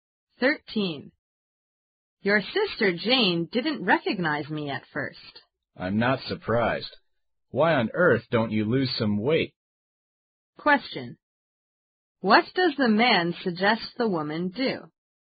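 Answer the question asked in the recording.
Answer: Lose some weight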